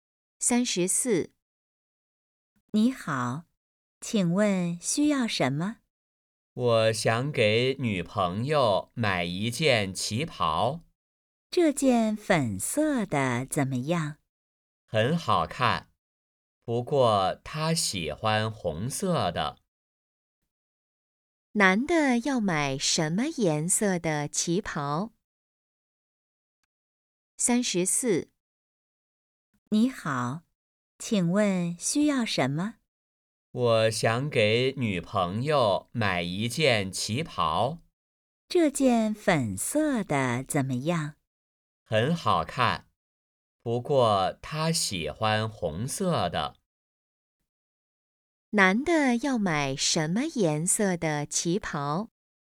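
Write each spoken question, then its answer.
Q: 男的要买什么颜色的旗袍?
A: 红色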